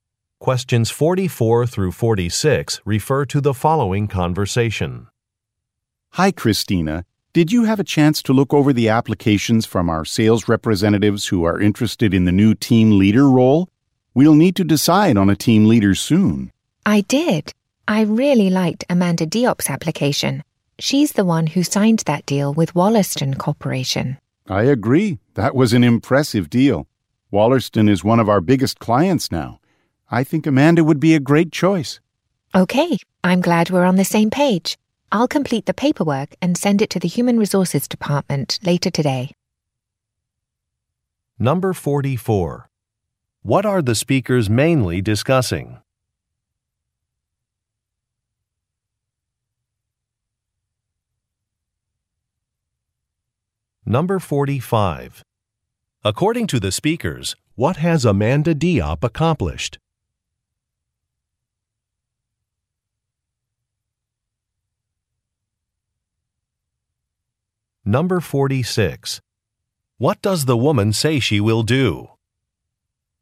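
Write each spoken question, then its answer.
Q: What are the speakers mainly discussing?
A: Choosing a new team leader

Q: According to the speakers, what has Amanda Diop accomplished?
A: She signed a deal with a major client, Wollaston Corporation

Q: What does the woman say she will do?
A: Complete paperwork and send it to Human Resources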